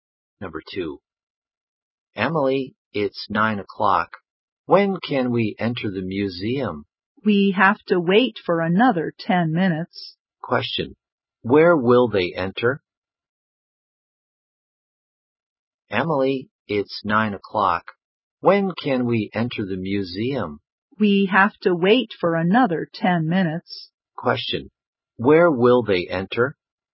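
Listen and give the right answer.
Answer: The museum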